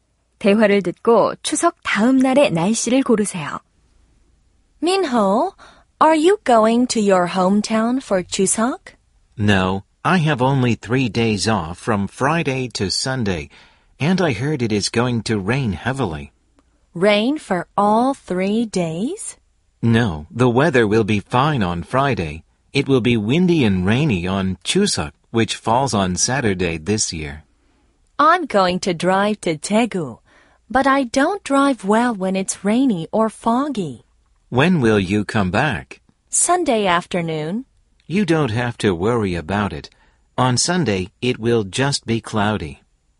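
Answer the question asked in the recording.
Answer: 흐림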